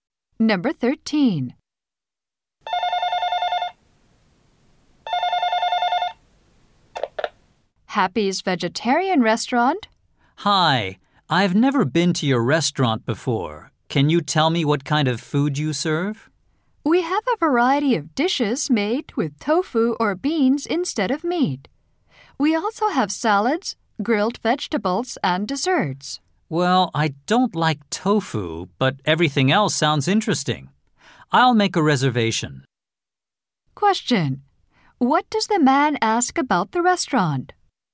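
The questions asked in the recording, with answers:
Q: What does the man ask about the restaurant?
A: What kind of food it serves.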